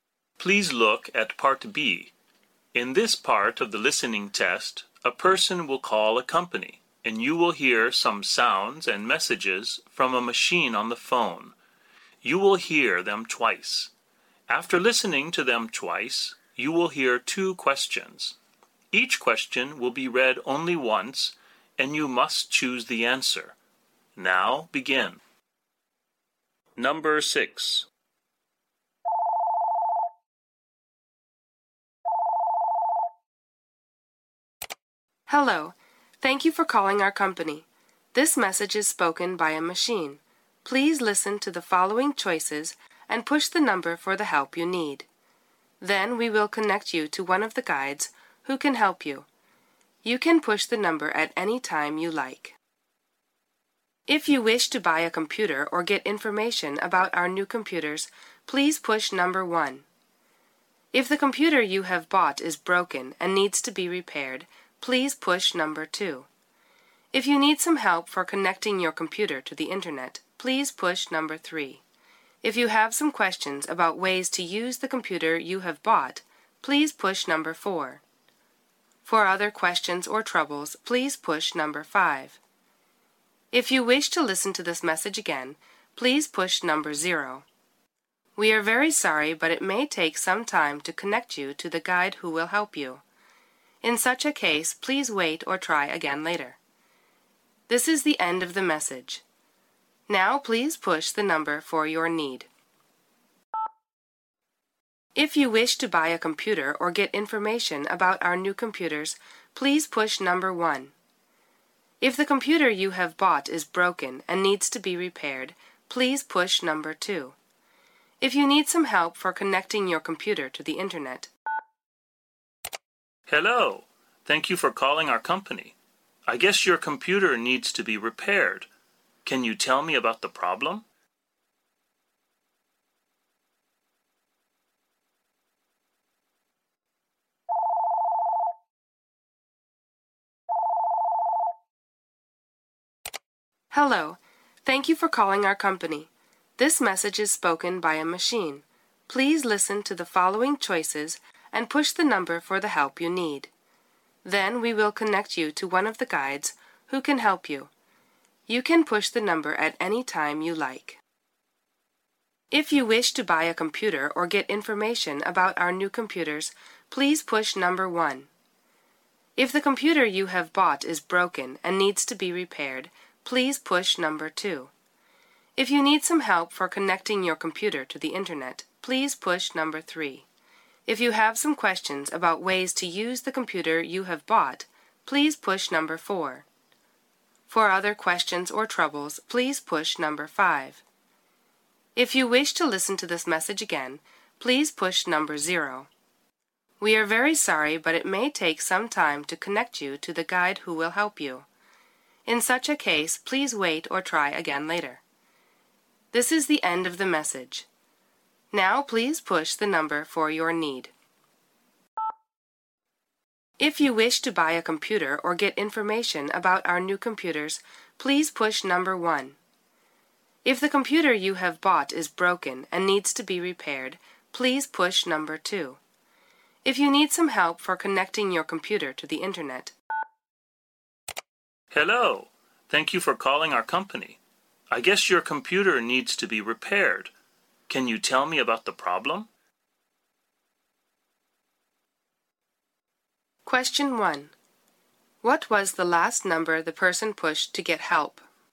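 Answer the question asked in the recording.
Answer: Number 2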